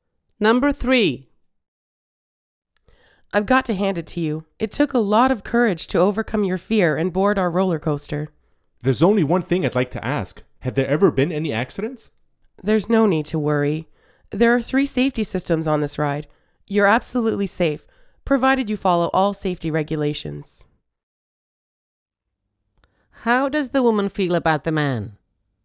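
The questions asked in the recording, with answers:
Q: How does the woman feel about the man?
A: She admires his courage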